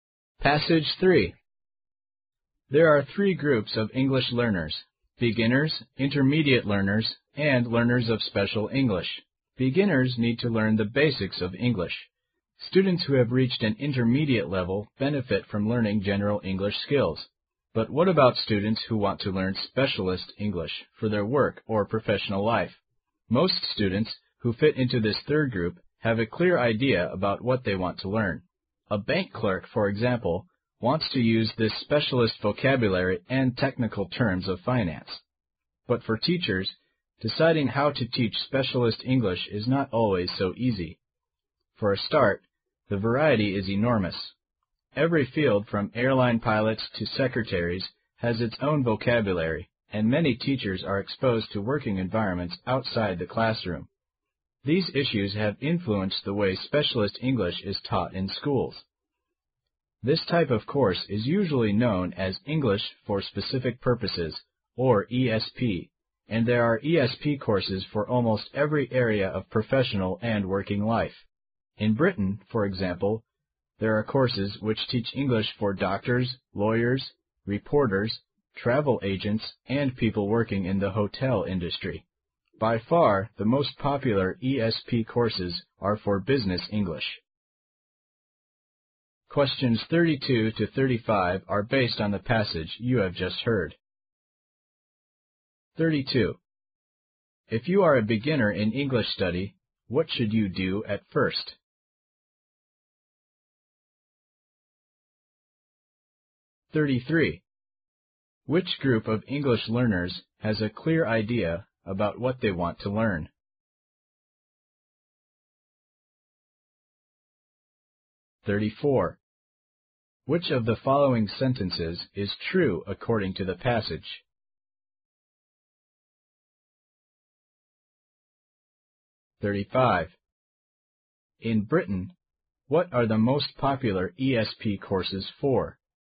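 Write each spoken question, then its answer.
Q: If you are a beginner in English study, what should you do at first?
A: Learn the basics of English

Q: Which group of English learners has a clear idea about what they want to learn?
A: Learners of special English

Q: In Britain, what are the most popular ESP courses for?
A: Business English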